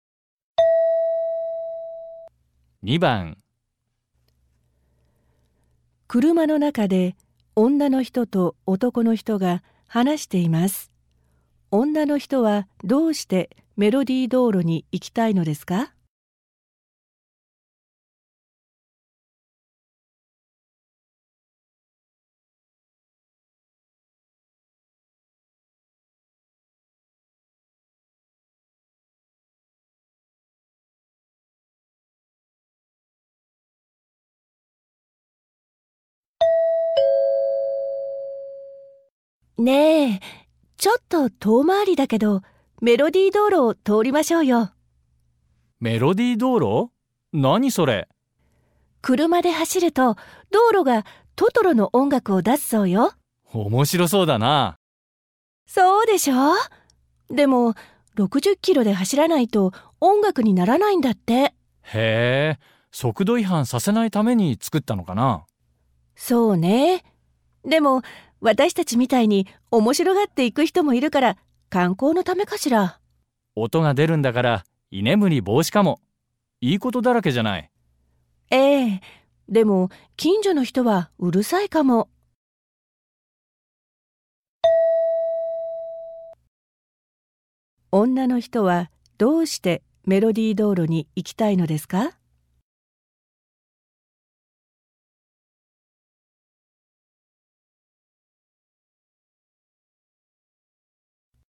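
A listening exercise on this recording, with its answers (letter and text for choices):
問題2では、まず質問を聞いてください。そのあと、問題用紙のせんたくしを読んでください。読む時間があります。それから話を聞いて、問題用紙の1から4の中から、最もよいものを一つ選んでください。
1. 女の人はどうしてメロディー道路に行きたいのですか。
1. 速度違反したくないから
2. 男の人にも見せてあげたいから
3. そちらが近道だから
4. 面白そうだから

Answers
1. 4. 面白そうだから

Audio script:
F:ねえ、ちょっと遠回りだけど、メロディー道路を通りましょうよ。
M:メロディー道路?何それ。/Đường giai điệu ư? Cái gì vậy?
F:車で走ると道路が「トトロ」の音楽を出すそうよ。
F:そうでしょう。でも60Kmで走らないと音楽にならないんだって。
M:へえ、速度違反させないために作ったのかな。
F:そうね。でも私たちみたいに面白がって行く人もいるから、観光のためかしら。
M:音が出るんだから居眠り防止かも。いいことだらけじゃない。
F:ええ、でも近所の人はうるさいかも。/Uh, nhưng có thể những người gần đấy thì thấy ồn.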